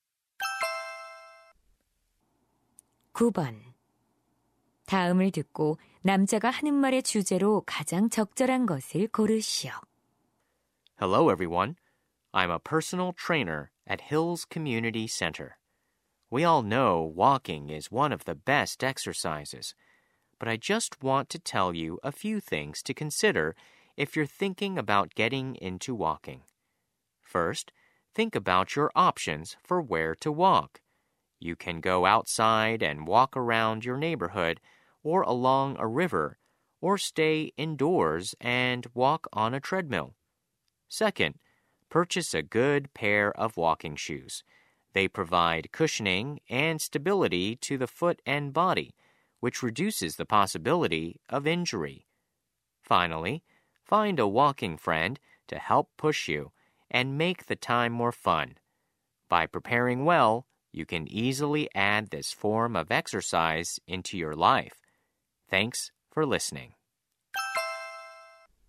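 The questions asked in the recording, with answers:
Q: 다음을 듣고 남자가 하는 말의 주제로 가장 적절한 것을 고르시오.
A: 걷기 운동을 시작할 때 고려할 사항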